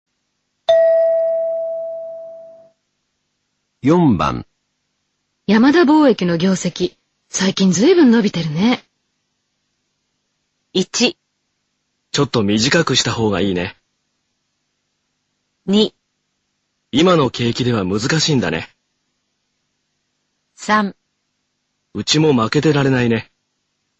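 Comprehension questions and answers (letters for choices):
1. 山田貿易の業績、最近、ずいぶん伸びてるね。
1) ちょっと短くしたほうがいいね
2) 今の景気では難しいんだね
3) うちも負けてられないね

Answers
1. 3

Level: N1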